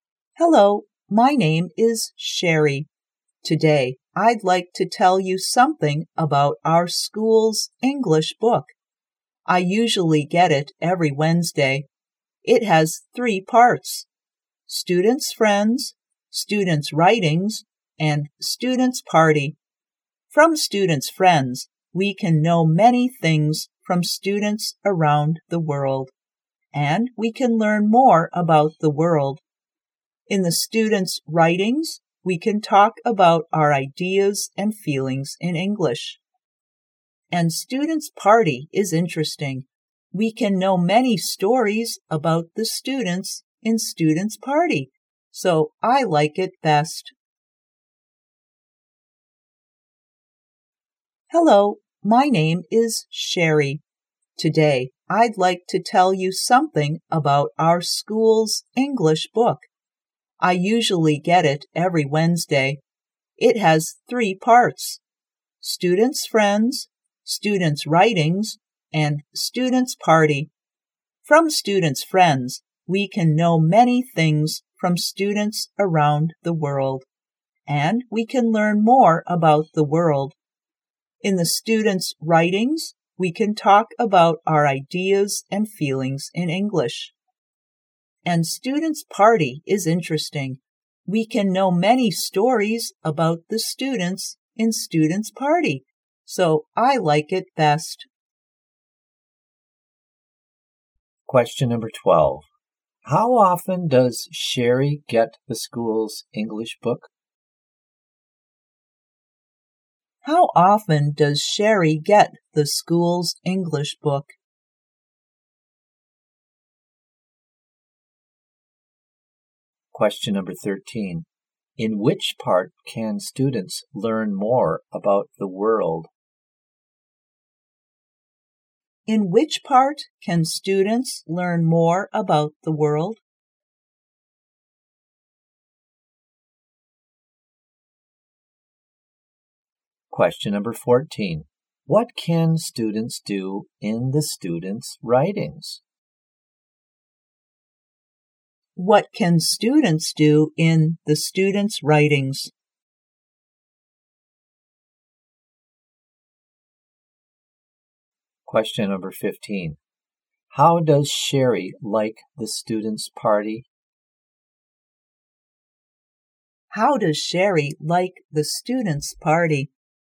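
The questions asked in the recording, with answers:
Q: How often does Sherry get the school's English book?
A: Every Wednesday (once a week).

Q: In which part can students learn more about the world?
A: Students' friends.

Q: What can students do in the students' writings?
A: Talk about their ideas and feelings in English.

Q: How does Sherry like the students' party?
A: She likes it best; it is interesting.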